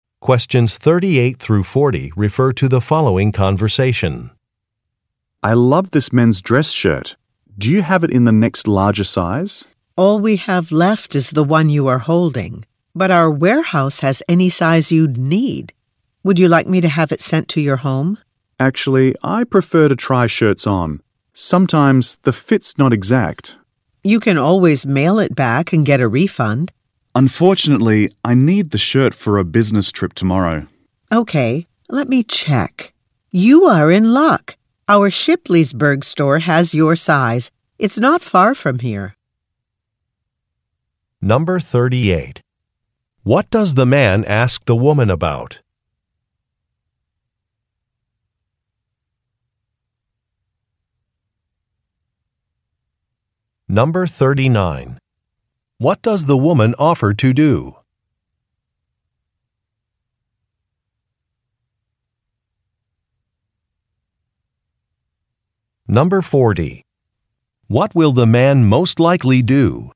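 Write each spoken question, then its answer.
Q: What does the man ask the woman about?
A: Whether the shirt is available in the next larger size

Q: What does the woman offer to do?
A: Have the shirt sent to his home

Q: What will the man most likely do?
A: Go to the Shipleysburg store to get the shirt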